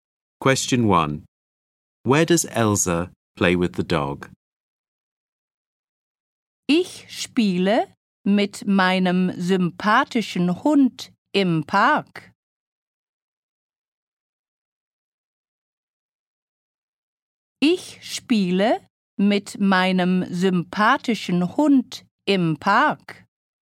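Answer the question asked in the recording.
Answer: In the park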